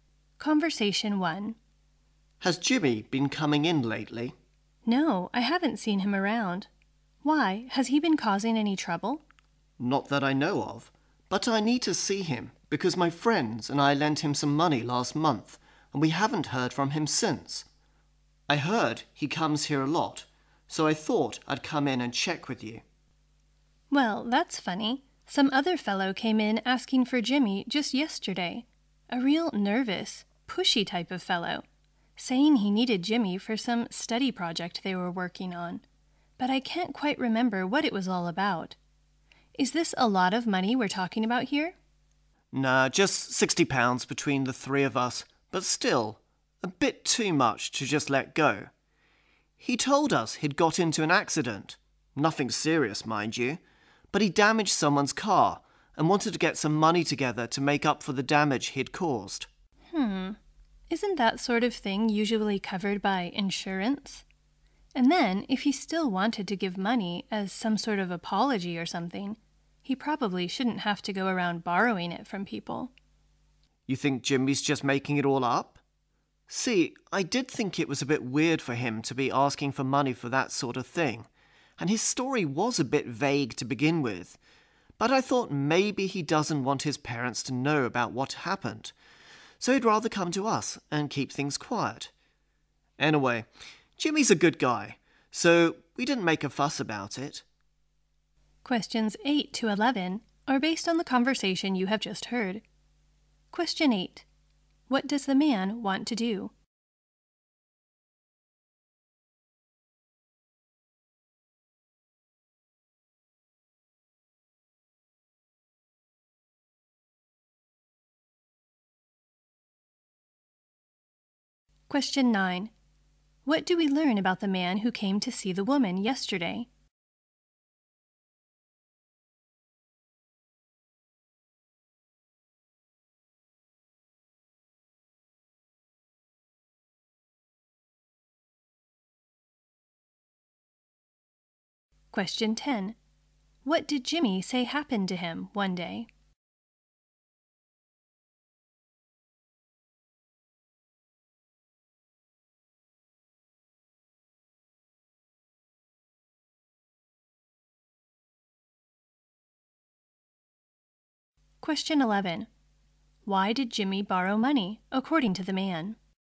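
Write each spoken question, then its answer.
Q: What does the man want to do?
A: Find Jimmy to get back the money lent to him

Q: What do we learn about the man who came to see the woman yesterday?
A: He was nervous and pushy, looking for Jimmy for a study project

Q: What did Jimmy say happened to him one day?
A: He had an accident and damaged someone's car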